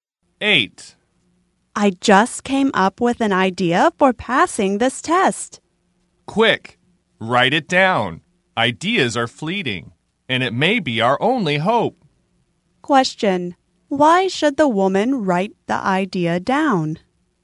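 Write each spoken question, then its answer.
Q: Why should the woman write the idea down?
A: Because ideas are fleeting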